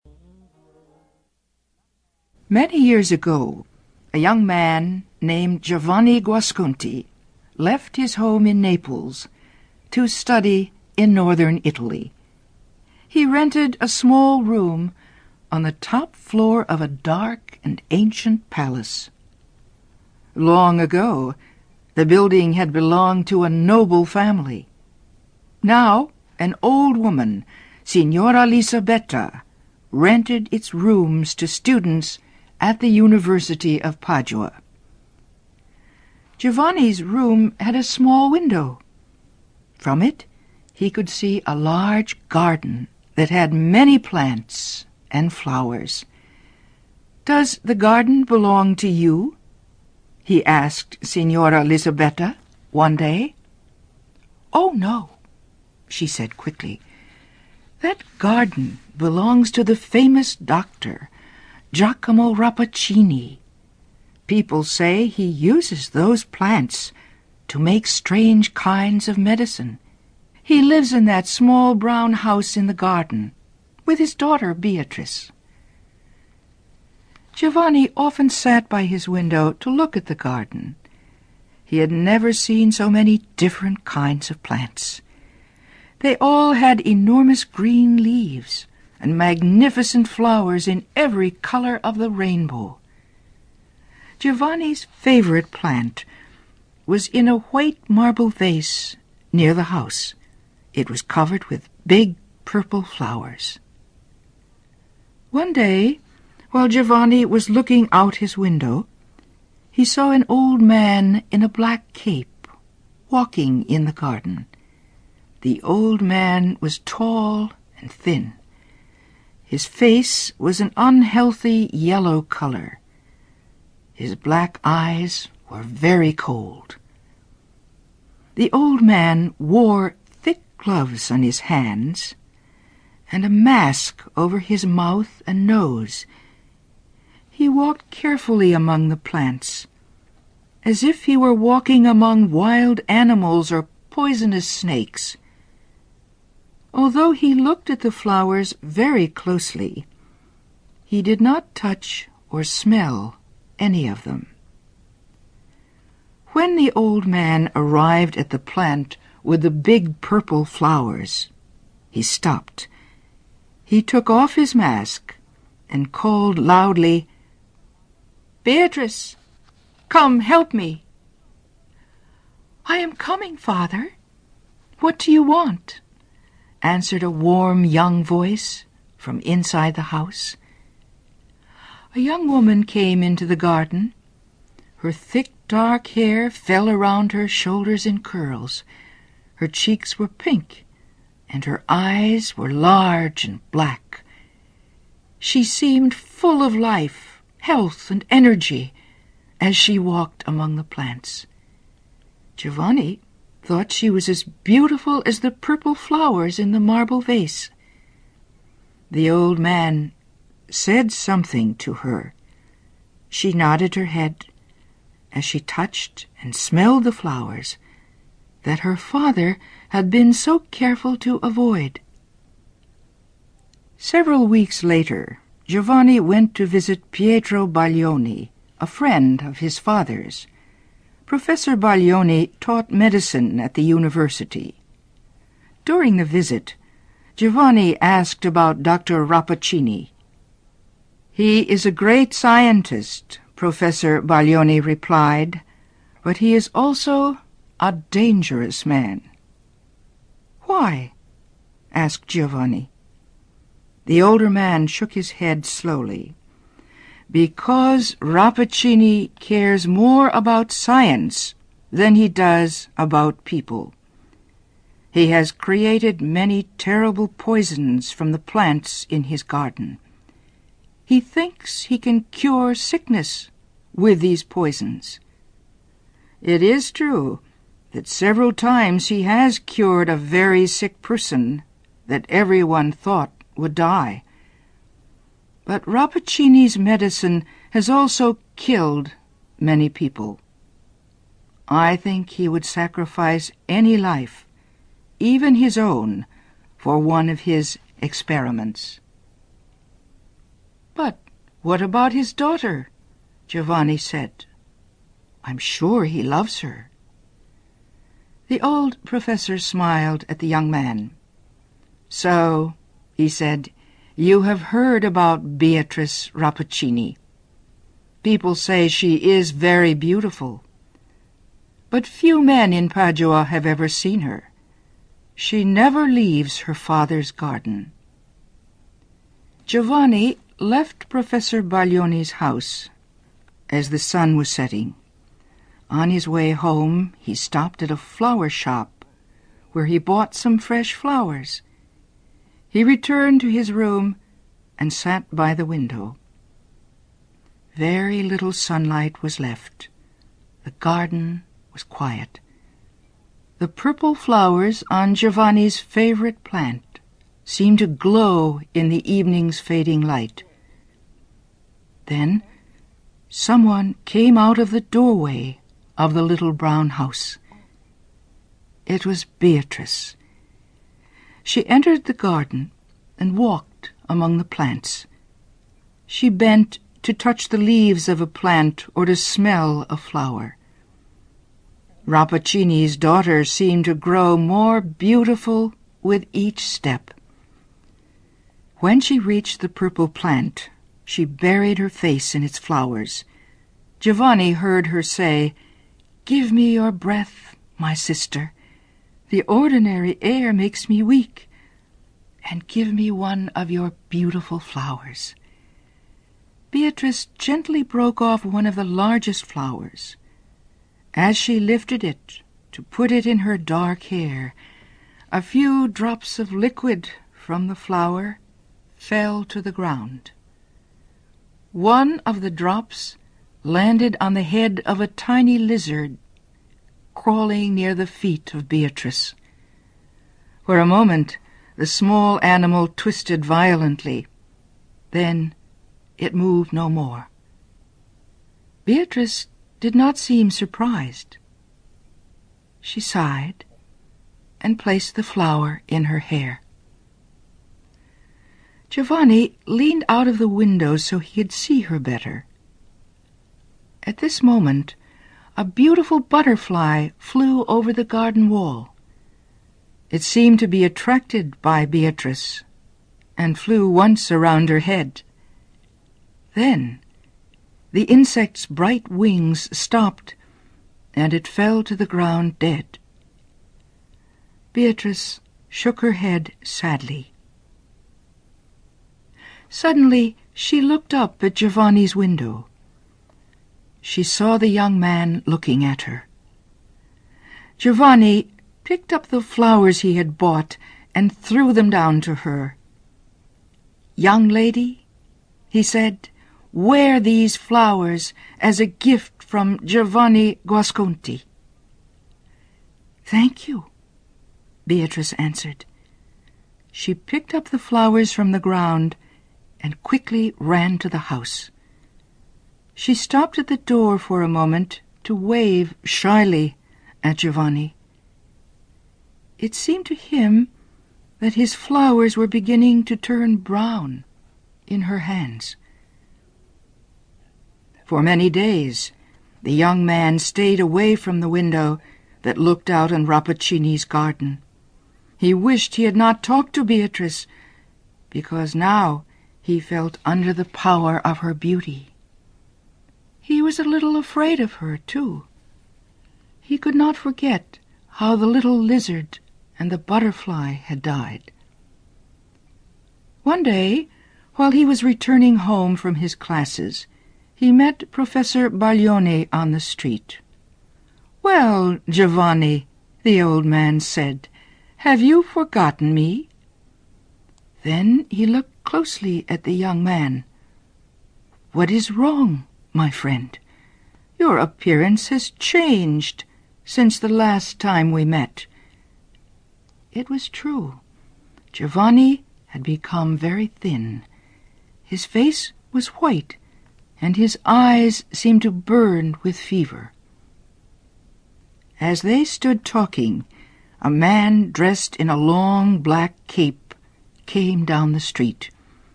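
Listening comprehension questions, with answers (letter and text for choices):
Listen carefully and for questions 1-10, choose the answer (A, B, C or D) which you think best completes each question.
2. Giovanni Guasconti is a/an...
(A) doctor.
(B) artist.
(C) scientist.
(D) student.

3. Who maintains Giovanni's living quarters?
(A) Dr. Rappaccini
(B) Signora Lisabetta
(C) Beatrice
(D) Professor Baglioni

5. Giovanni Guasconti knows about Professor Pietro Baglioni because Baglioni is...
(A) a friend of Giovanni's father.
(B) Beatrice's father.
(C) Dr. Rappaccini's close friend.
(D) his uncle.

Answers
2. (D) student.
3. (B) Signora Lisabetta
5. (A) a friend of Giovanni's father.

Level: CAE - Certificate in Advanced English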